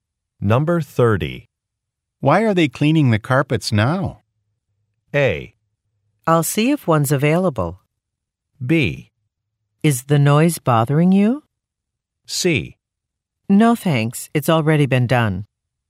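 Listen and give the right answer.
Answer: B: Is the noise bothering you?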